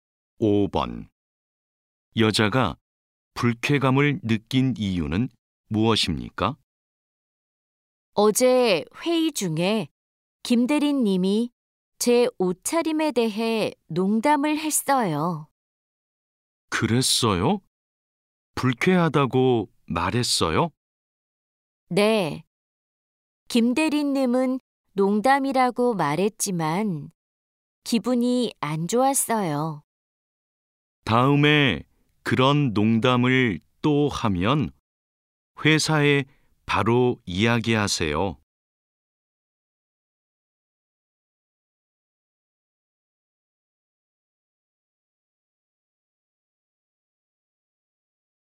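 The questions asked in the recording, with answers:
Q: 여자가 불쾌감을 느낀 이유는 무엇입니까?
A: 김대리님이 회의 중에 여자의 옷차림에 대해 농담을 해서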